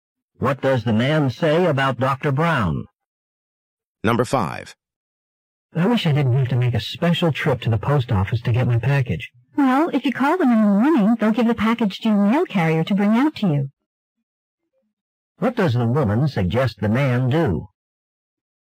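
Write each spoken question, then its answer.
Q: What does the woman suggest the man do?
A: Call the post office in the morning to have the package delivered.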